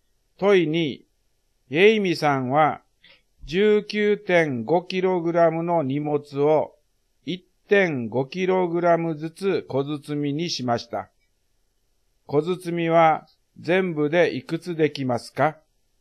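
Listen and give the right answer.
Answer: 13個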